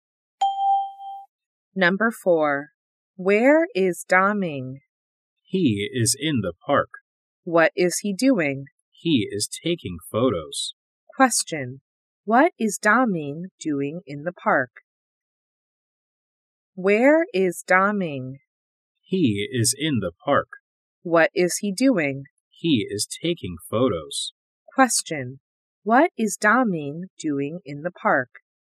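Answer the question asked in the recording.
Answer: He is taking photos.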